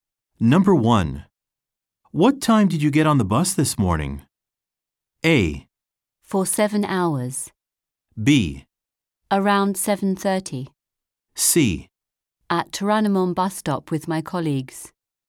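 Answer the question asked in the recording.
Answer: B: Around 7:30.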